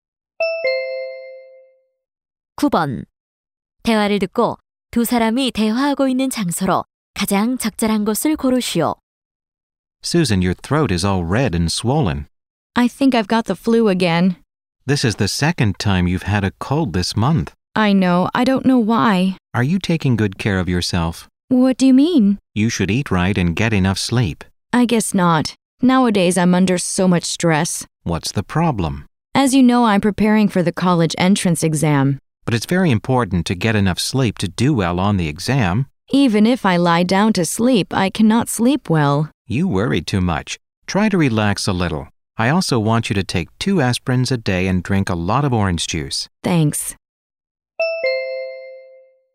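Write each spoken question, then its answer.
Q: 대화를 듣고 두 사람이 대화하고 있는 장소로 가장 적절한 곳을 고르시오.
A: 병원 (진료실)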